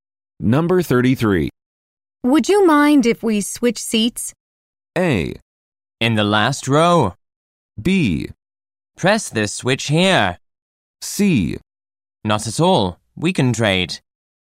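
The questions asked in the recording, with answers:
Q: Would you mind if we switch seats?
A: C: Not at all. We can trade.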